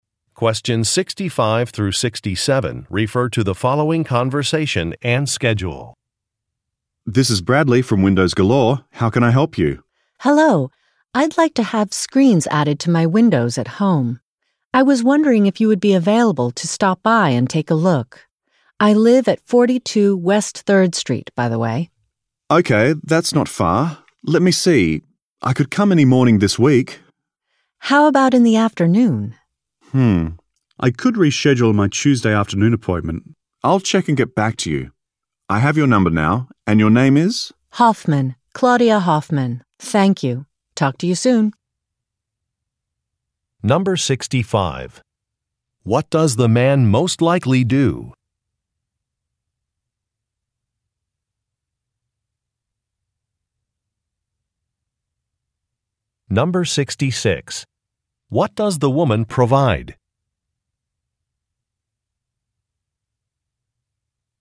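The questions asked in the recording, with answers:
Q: What does the man most likely do?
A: He works for a window company (Windows Galore), installing window screens

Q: What does the woman provide?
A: Her address (42 West 3rd Street)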